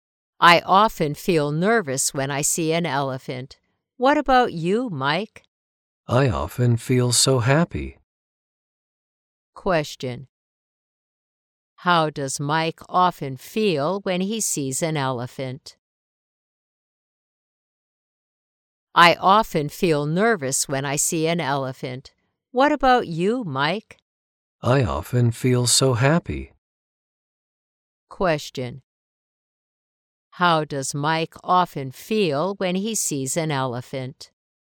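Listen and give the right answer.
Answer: Happy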